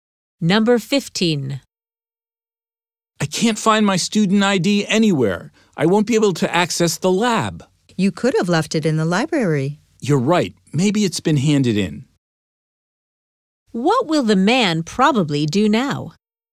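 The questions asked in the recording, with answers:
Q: What will the man probably do now?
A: Go to the library to see if his ID was handed in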